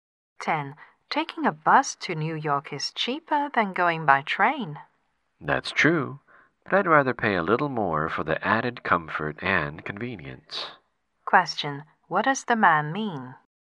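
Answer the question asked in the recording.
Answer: He prefers taking the train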